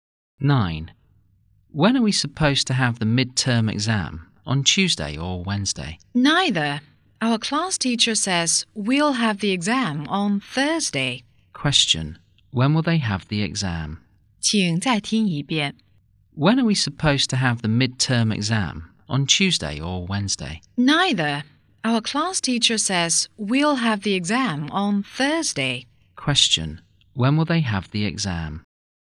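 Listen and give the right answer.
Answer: On Thursday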